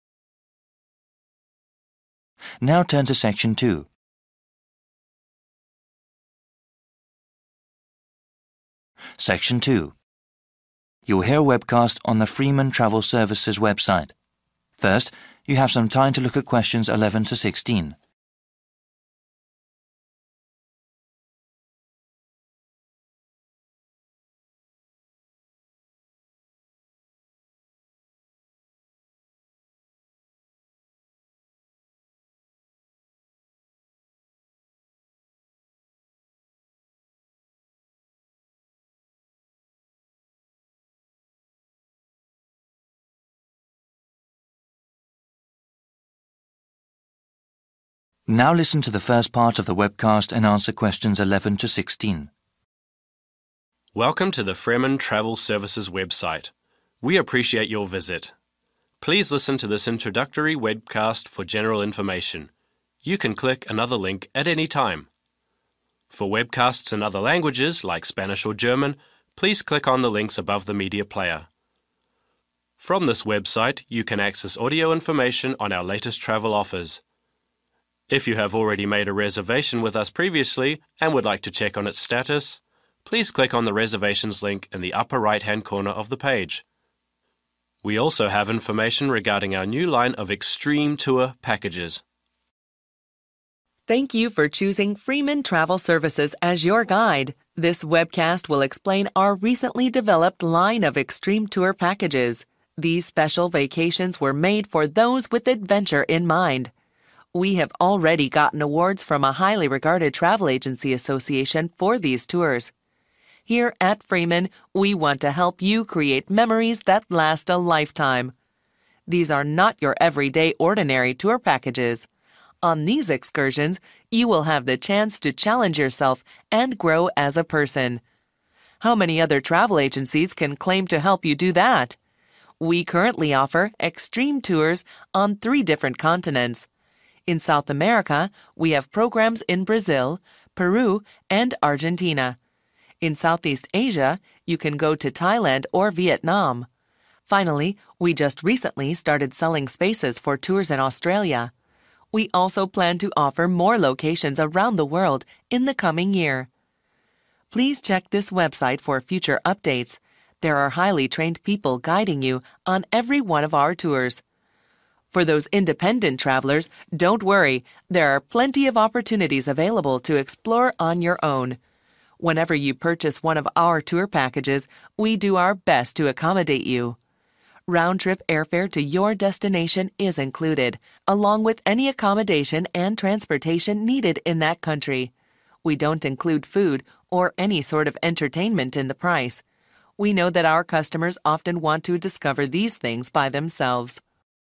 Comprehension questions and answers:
Choose the correct letter A, B or C.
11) To find out more about reservations, one needs to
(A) click a link in a corner of the page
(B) navigate to another page on the website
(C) call a number that is at the bottom of the page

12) 'Extreme Tours' are special vacation packages for those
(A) who desire to visit safe destinations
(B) who need to see familiar places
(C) who want to have a really exciting experience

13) The travel agency says these excursions will give people the chance to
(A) see famous and well-known tourist sites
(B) test themselves and become stronger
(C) buy lots of interesting souvenirs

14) The company has offices in South America, Australia and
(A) North America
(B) Southeast Asia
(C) Europe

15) Unlike other companies, Fremen allows you to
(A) hire a car for the duration of your vacation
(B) travel about independently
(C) speak with a travel agent for free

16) Included in all tour packages is the cost of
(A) airfare, accommodation and transportation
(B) food and entertainment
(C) tour guides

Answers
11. (A) click a link in a corner of the page
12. (C) who want to have a really exciting experience
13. (B) test themselves and become stronger
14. (B) Southeast Asia
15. (B) travel about independently
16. (A) airfare, accommodation and transportation

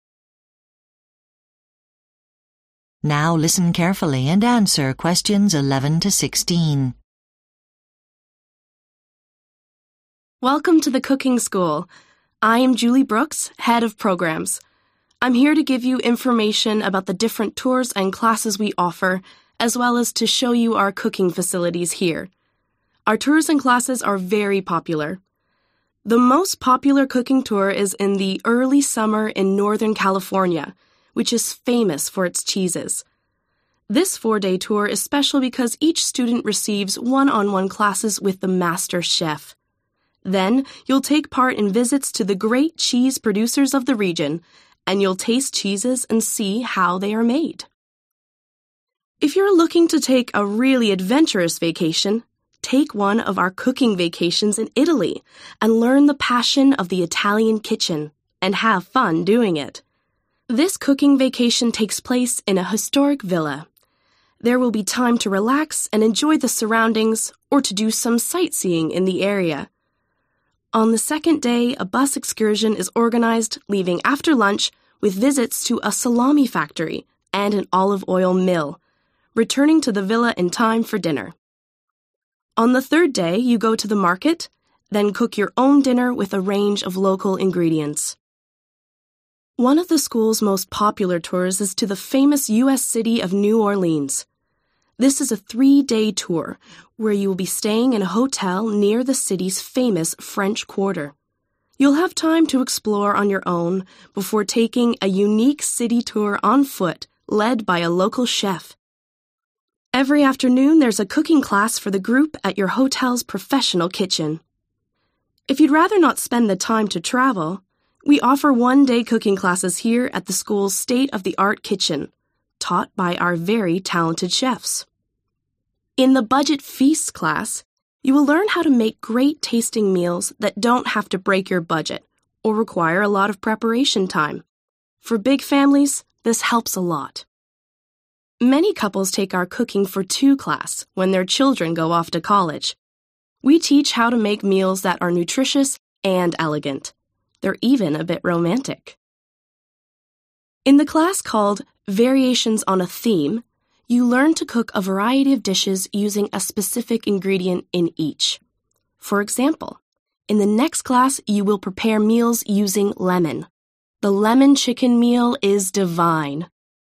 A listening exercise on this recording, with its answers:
Which special feature does each cooking tour or class have? Choose the correct letter, A–H, from the dropdown menu.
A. cook with one particular ingredient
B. learn about food history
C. have individual cooking lessons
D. make meals for college students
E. prepare healthy meals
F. go on a guided walking tour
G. make time-saving meals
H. go on an afternoon bus tour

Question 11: The most popular cooking tour in Northern California ______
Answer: C. have individual cooking lessons

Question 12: Cooking vacation in Italy ______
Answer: H. go on an afternoon bus tour

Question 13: Tour to New Orleans ______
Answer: F. go on a guided walking tour

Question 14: Budget feast class ______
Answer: G. make time-saving meals

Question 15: Cooking for Two class ______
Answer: E. prepare healthy meals

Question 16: Variations on a Theme class ______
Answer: A. cook with one particular ingredient

